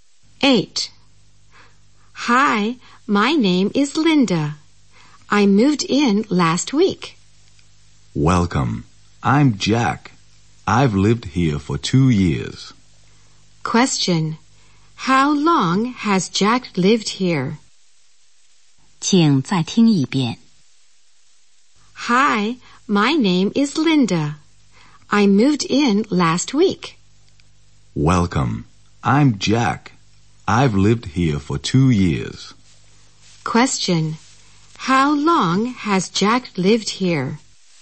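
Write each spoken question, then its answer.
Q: How long has Jack lived here?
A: For 2 years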